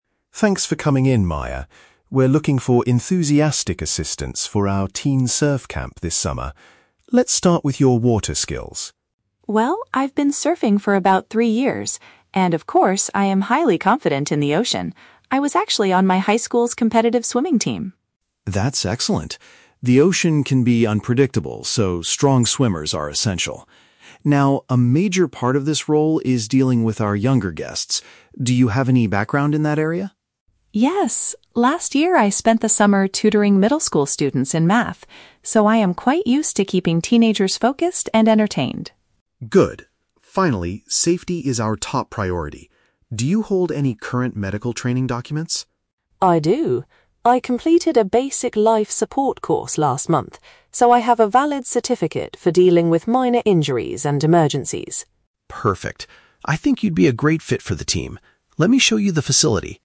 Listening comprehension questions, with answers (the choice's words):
Listen to the job interview at a summer surf camp. Choose the correct answer (A, B, or C) for each question.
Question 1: What makes Maya a suitable candidate for the water activities?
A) She has worked as a professional surfing teacher for three years.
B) She used to race for her school's aquatic group.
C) She recently won a national surfing competition.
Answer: She used to race for her school's aquatic group.

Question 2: How did Maya gain experience working with younger people?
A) By helping younger students with their academic subjects.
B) By organizing summer sports events for middle schoolers.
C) By taking care of her younger brothers and sisters at home.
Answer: By helping younger students with their academic subjects.

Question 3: What does the director want to know about Maya's safety qualifications?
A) If she knows how to rescue people from a sinking boat.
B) If she is planning to take a life support class next month.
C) If she possesses up-to-date emergency health paperwork.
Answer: If she possesses up-to-date emergency health paperwork.

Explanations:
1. Maya says, "I was actually on my high school's competitive swimming team." "Race for an aquatic group" is a paraphrase of being on a competitive swimming team. Why the traps are wrong: Option A is a trap; she mentions "surfing for about three years," but she never says she was a professional teacher. Option C is plausible for a surfer, but it is not mentioned in the audio.
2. Maya explains she spent last summer "tutoring middle school students in math." Tutoring in math perfectly matches "helping younger students with their academic subjects." Why the traps are wrong: Option B is a trap; it uses the words "summer" and "middle school" from the audio, but she taught math, not sports events. Option C is never mentioned.
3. Mr. Evans asks if she holds "any current medical training documents." Maya answers that she has a "valid certificate" for emergencies. This matches option C ("up-to-date emergency health paperwork"). Why the traps are wrong: Option A is not mentioned. Option B is a trap; the audio mentions "last month" (when she completed the course), but option B says "next month."

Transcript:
Evans: Thanks for coming in, Maya. We're looking for enthusiastic assistants for our teen surf camp this summer. Let's start with your water skills.
Maya: Well, I've been surfing for about three years. And of course, I am highly confident in the ocean. I was actually on my high school's competitive swimming team.
Evans: That's excellent. The ocean can be unpredictable, so strong swimmers are essential. Now, a major part of this role is dealing with our younger guests. Do you have any background in that area?
Maya: Yes. Last year, I spent the summer tutoring middle school students in math. So, I am quite used to keeping teenagers focused and entertained.
Evans: Good. Finally, safety is our top priority. Do you hold any current medical training documents?
Maya: I do. I completed a basic life support course last month, so I have a valid certificate for dealing with minor injuries and emergencies.
Evans: Perfect. I think you'd be a great fit for the team. Let me show you the facility.